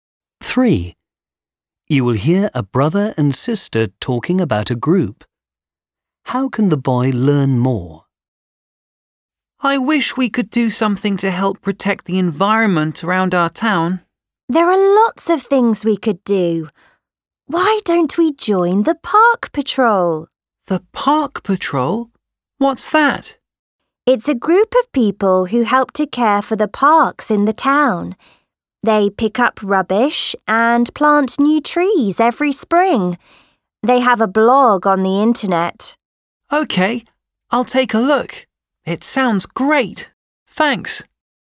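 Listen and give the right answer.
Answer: By looking at the group's blog on the internet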